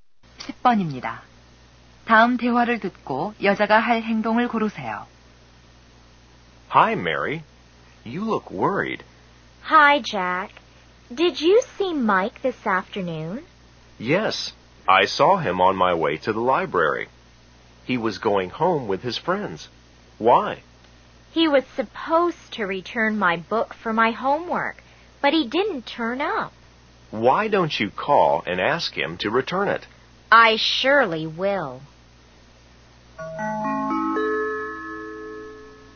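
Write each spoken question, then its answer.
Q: 다음 대화를 듣고 여자가 할 행동을 고르세요.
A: 마이크에게 전화하기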